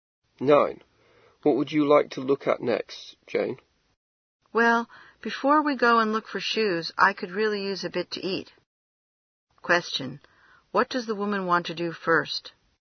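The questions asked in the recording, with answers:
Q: What does the woman want to do first?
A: Get something to eat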